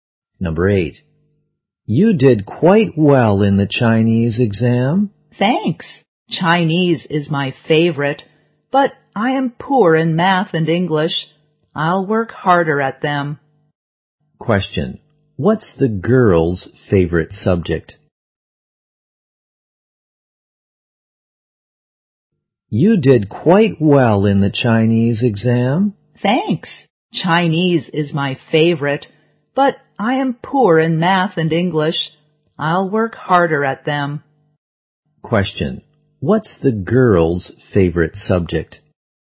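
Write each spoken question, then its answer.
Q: What's the girl's favorite subject?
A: Chinese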